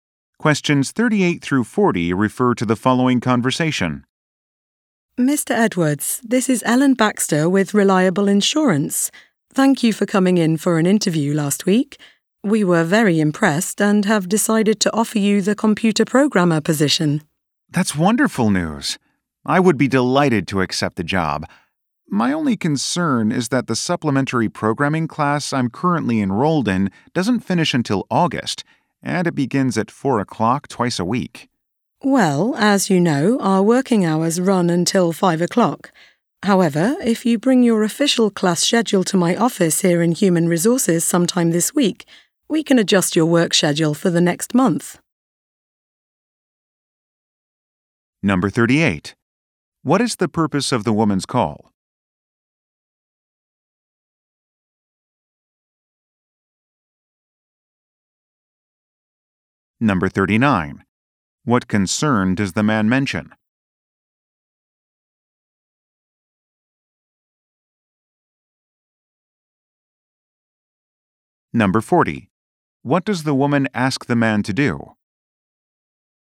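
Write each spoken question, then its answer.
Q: What is the purpose of the woman's call?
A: To offer him the computer programmer job

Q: What concern does the man mention?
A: His class clashes with working hours

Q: What does the woman ask the man to do?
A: Bring his class schedule to her office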